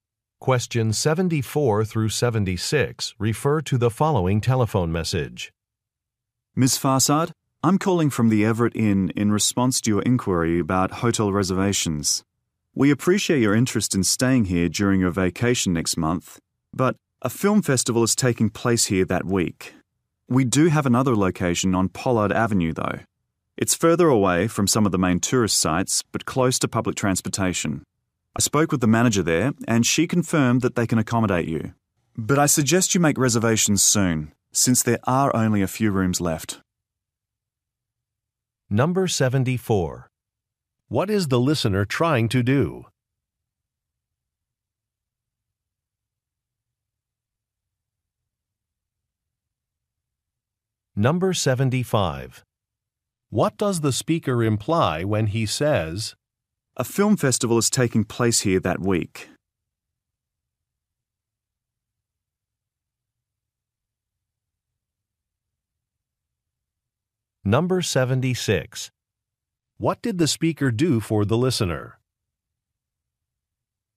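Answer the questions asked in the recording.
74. Make a hotel reservation
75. The hotel is fully booked that week
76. Spoke with the manager of another location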